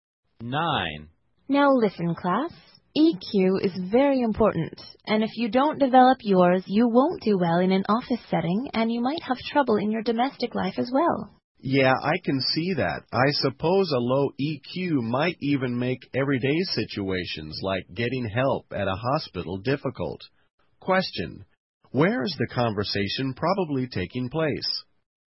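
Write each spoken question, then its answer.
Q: Where is the conversation probably taking place?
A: In a classroom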